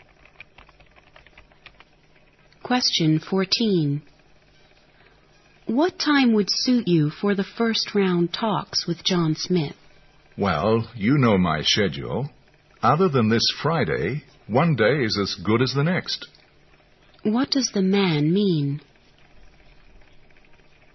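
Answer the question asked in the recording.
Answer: Any day except this Friday suits him.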